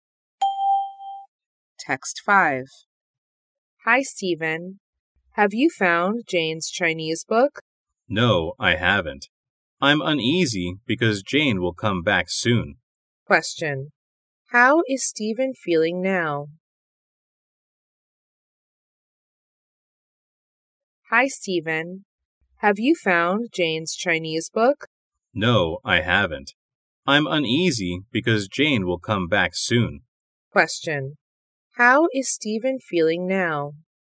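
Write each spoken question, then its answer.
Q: How is Stephen feeling now?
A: Uneasy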